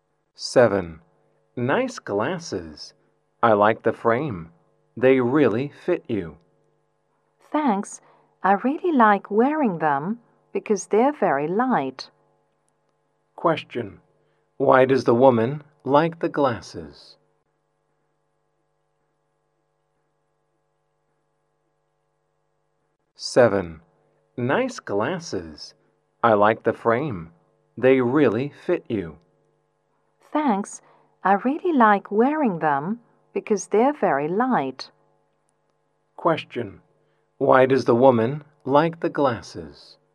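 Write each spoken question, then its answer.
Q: Why does the woman like the glasses?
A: Because they're very light.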